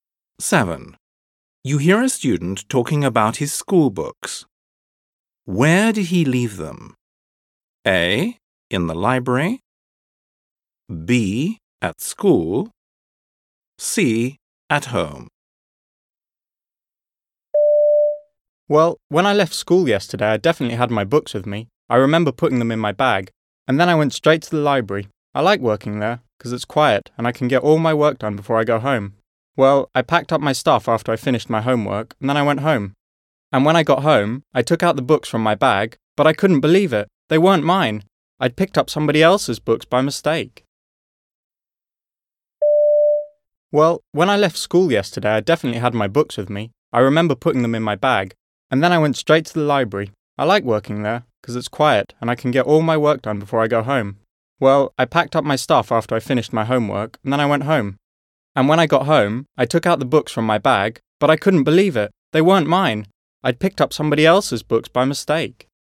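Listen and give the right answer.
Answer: A: In the library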